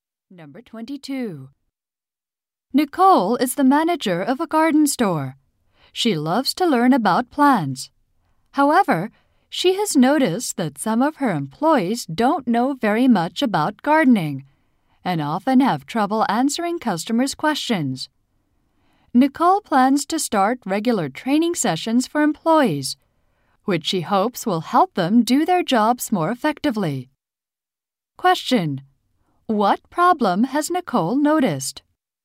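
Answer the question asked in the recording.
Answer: Some employees don't know much about gardening.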